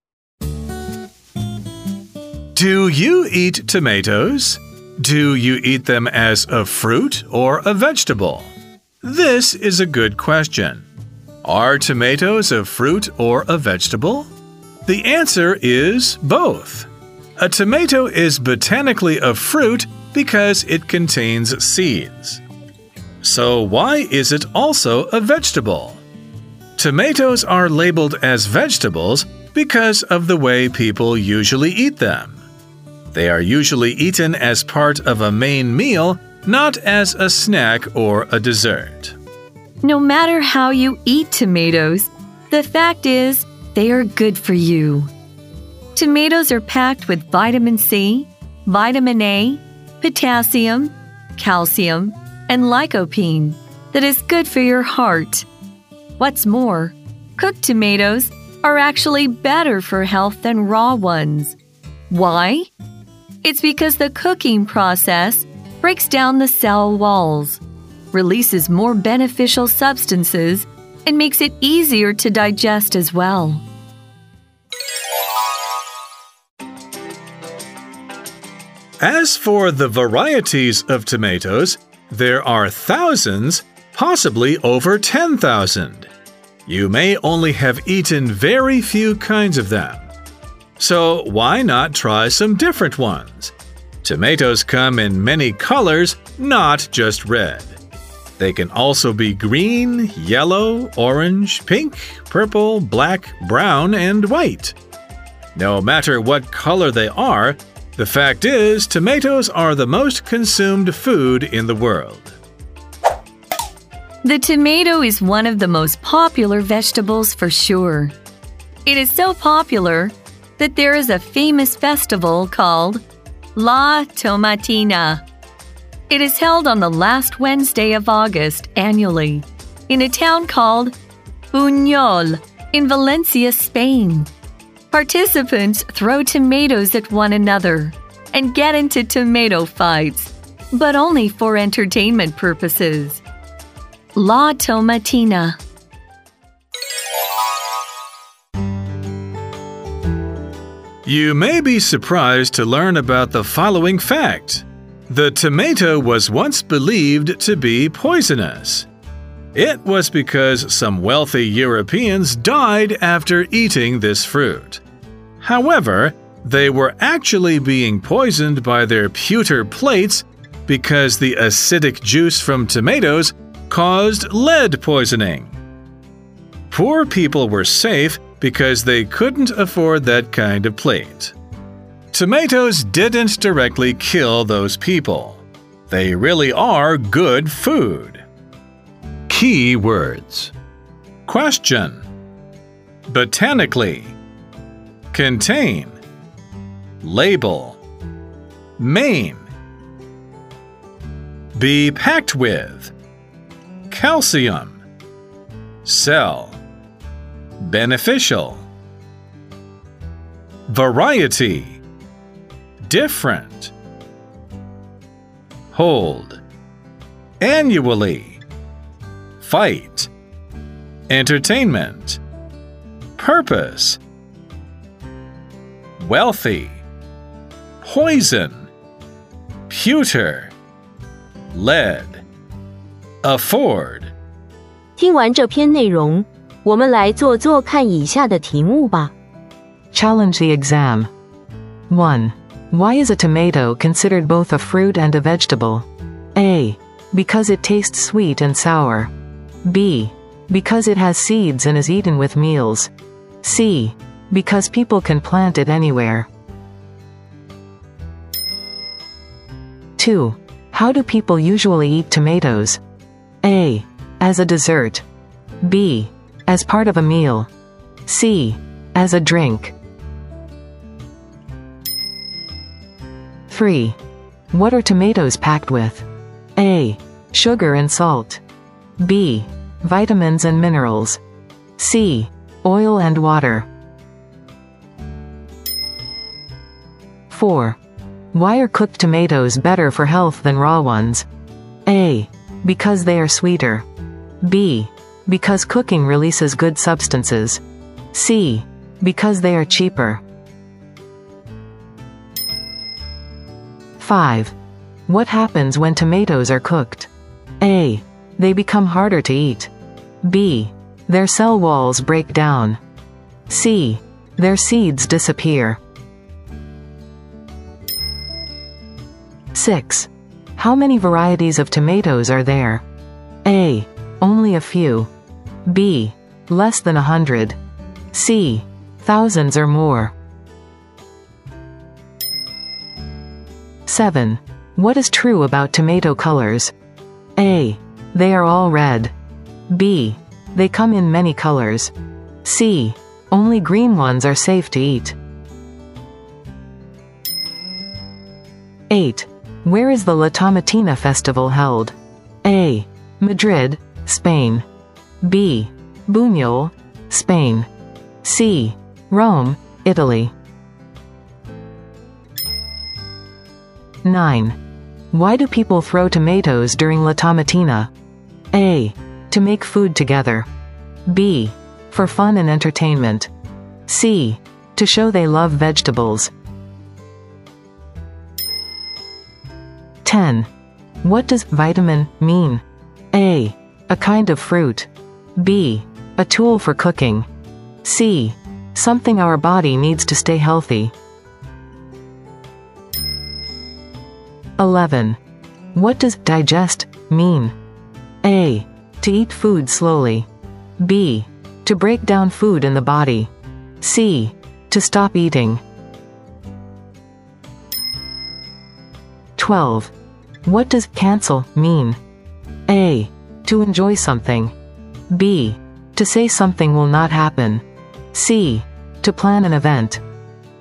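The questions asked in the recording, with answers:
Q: Why is a tomato considered both a fruit and a vegetable?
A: B: Because it has seeds and is eaten with meals.

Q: How do people usually eat tomatoes?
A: B: As part of a meal.

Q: What are tomatoes packed with?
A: B: Vitamins and minerals.

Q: Why are cooked tomatoes better for health than raw ones?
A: B: Because cooking releases good substances.

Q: What happens when tomatoes are cooked?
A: B: Their cell walls break down.

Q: How many varieties of tomatoes are there?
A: C: Thousands or more.

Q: What is true about tomato colors?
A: B: They come in many colors.

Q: Where is the La Tomatina Festival held?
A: B: Buñol, Spain.

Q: Why do people throw tomatoes during La Tomatina?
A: B: For fun and entertainment.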